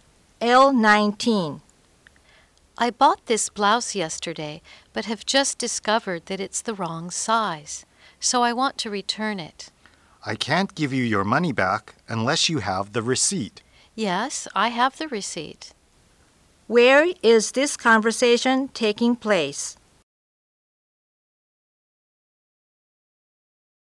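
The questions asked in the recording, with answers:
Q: Where is this conversation taking place?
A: At a clothing store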